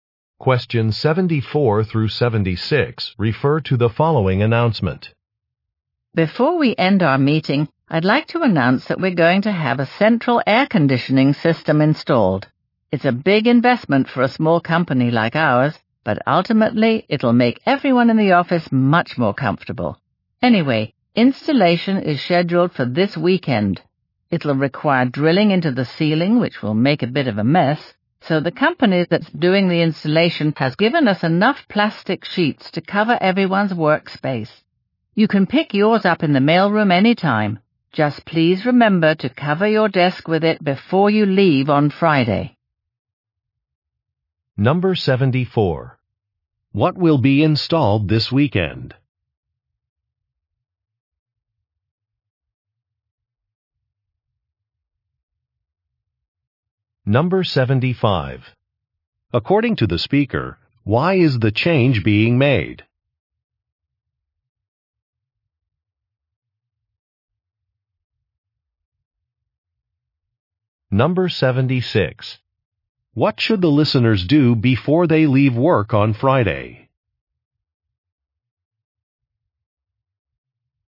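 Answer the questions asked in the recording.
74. A central air conditioning system
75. To make everyone in the office more comfortable
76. Cover their desks with plastic sheets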